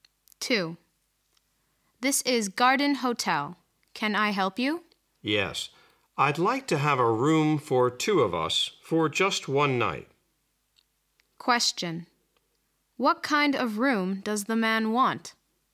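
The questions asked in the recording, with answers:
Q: What kind of room does the man want?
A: A double room for one night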